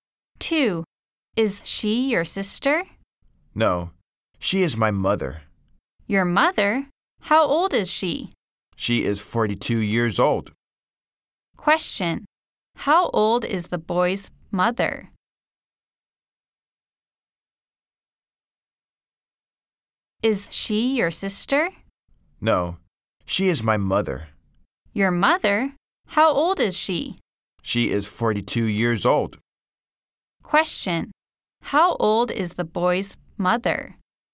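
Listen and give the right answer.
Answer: 42 years old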